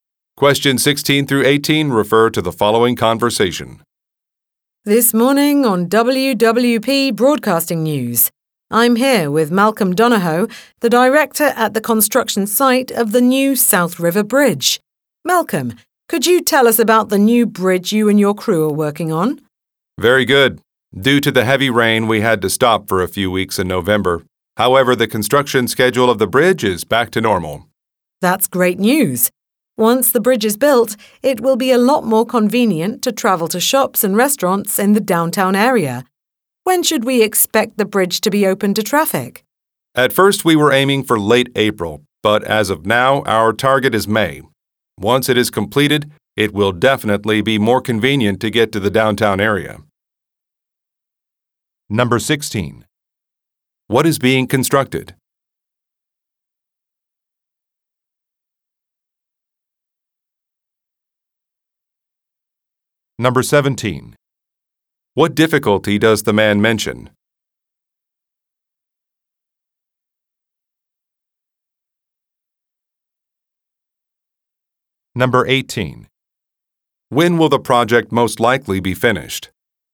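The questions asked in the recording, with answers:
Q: What is being constructed?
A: A bridge

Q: What difficulty does the man mention?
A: Heavy rain stopped construction

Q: When will the project most likely be finished?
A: In May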